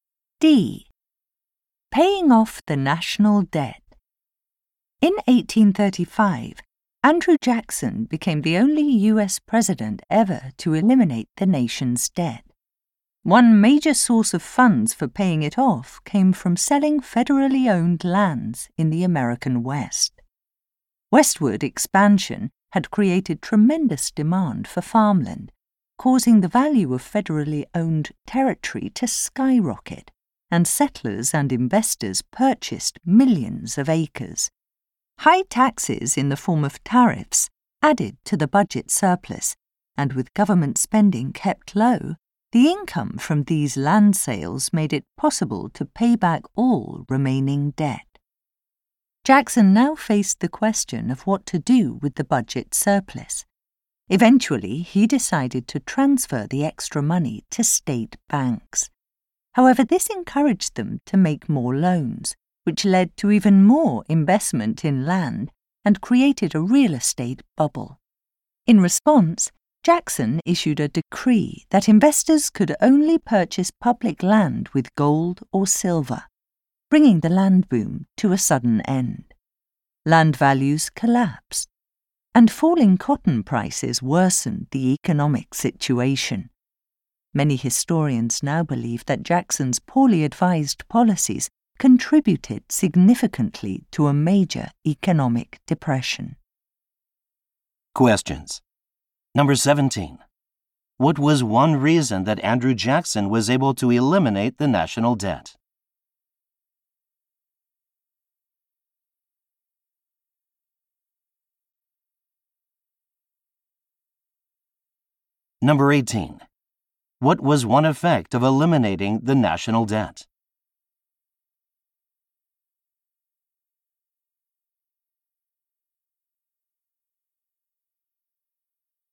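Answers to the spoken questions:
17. Income from selling federal lands in the West
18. Surplus sent to state banks created a real estate bubble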